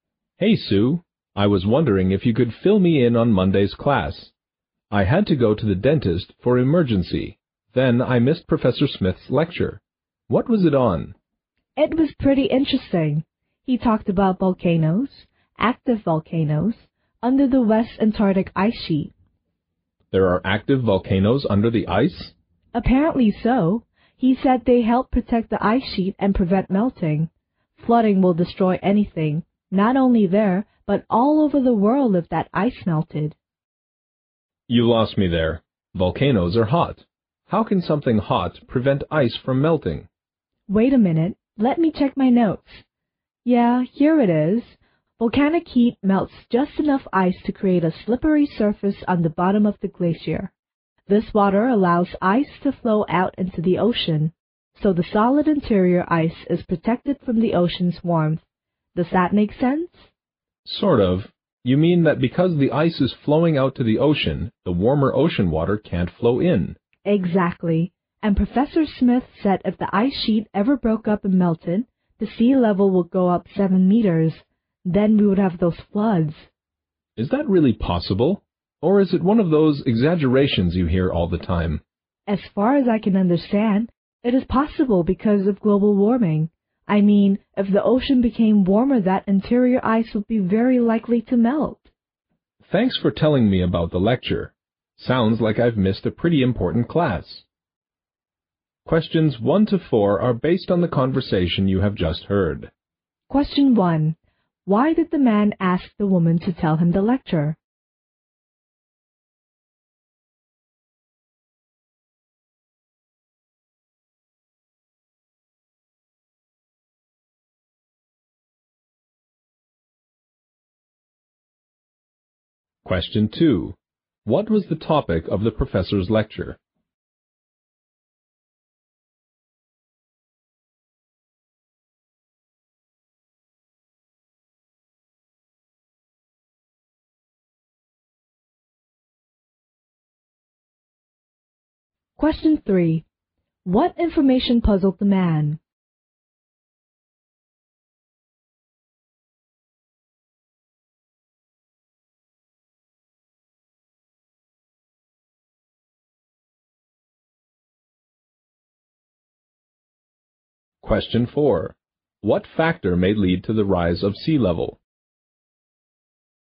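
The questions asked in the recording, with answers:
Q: Why did the man ask the woman to tell him the lecture?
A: He missed it because he went to the dentist for an emergency.

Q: What was the topic of the professor's lecture?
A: Active volcanoes under the West Antarctic ice sheet.

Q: What information puzzled the man?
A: That hot volcanoes could prevent the ice from melting.

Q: What factor may lead to the rise of sea level?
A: Global warming.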